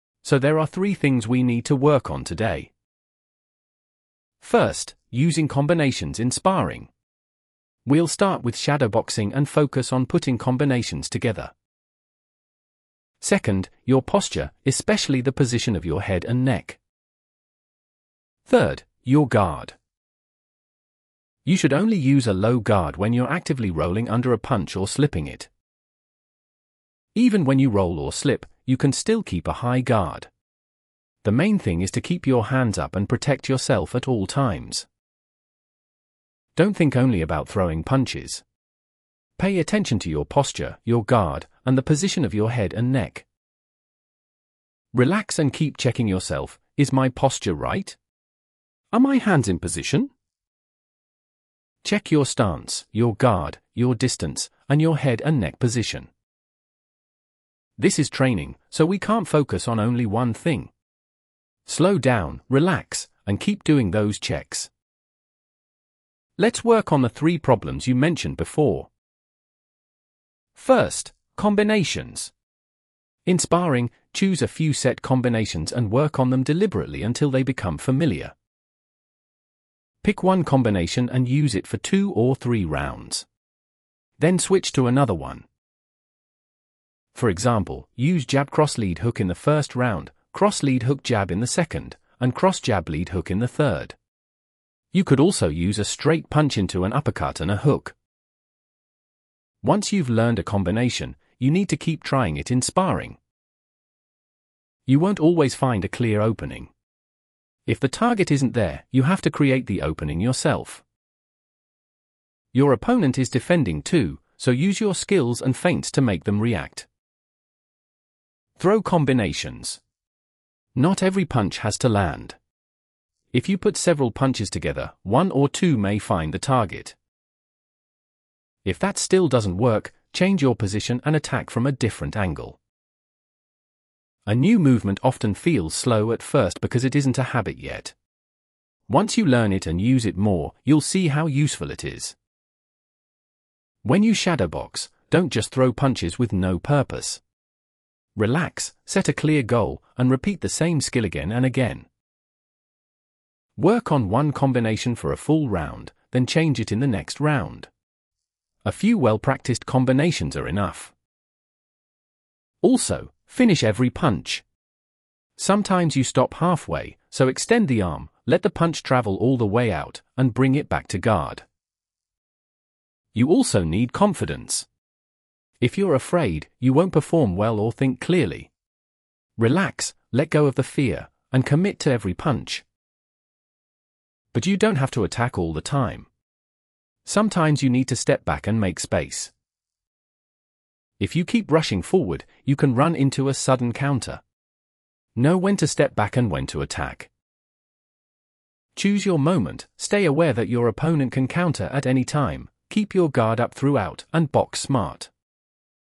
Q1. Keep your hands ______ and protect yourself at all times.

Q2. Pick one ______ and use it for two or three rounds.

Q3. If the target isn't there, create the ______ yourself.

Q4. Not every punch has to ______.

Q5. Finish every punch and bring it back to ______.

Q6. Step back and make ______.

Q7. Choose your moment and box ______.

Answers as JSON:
{"1": "up", "2": "combination", "3": "opening", "4": "land", "5": "guard", "6": "space", "7": "smart"}